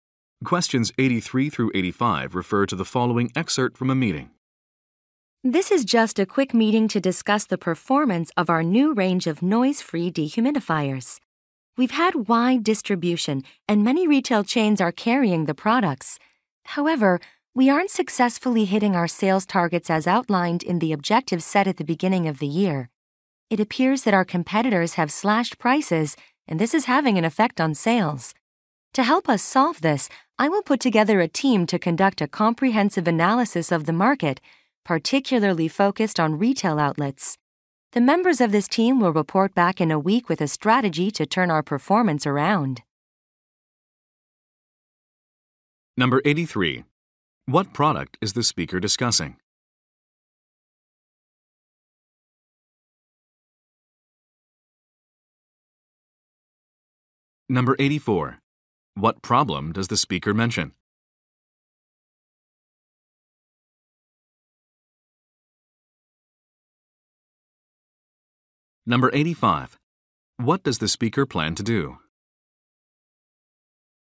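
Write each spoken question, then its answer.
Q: What product is the speaker discussing?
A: Dehumidifiers

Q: What problem does the speaker mention?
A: Sales targets are not being met

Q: What does the speaker plan to do?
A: Form a team to analyze the market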